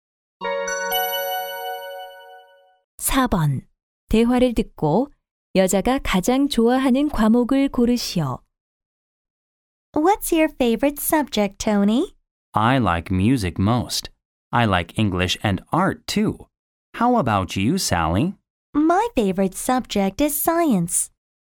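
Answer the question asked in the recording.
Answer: 과학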